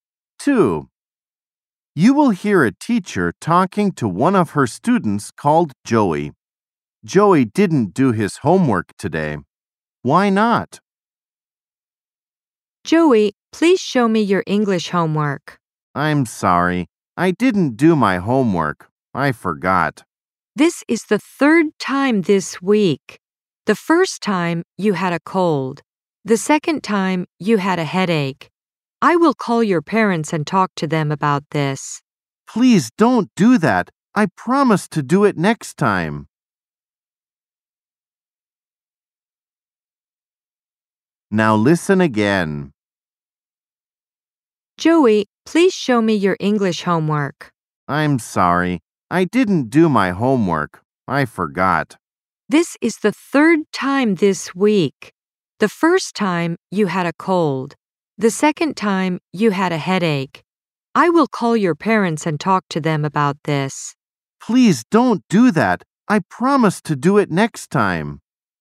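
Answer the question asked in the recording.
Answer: He forgot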